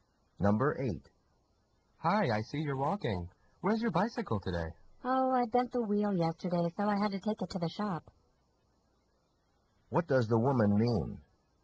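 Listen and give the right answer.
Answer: Her bicycle is being repaired at the shop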